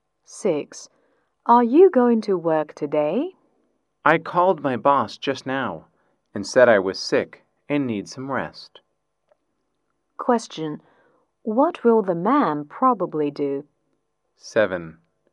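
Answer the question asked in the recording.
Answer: Stay at home and rest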